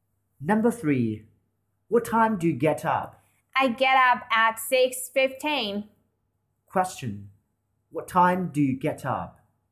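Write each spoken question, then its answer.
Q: What time do you get up?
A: At 6:15.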